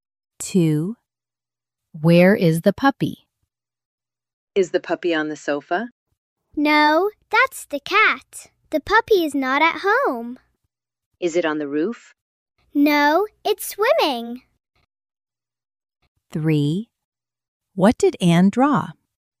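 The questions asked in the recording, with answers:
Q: Where is the puppy?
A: It's swimming (not at home)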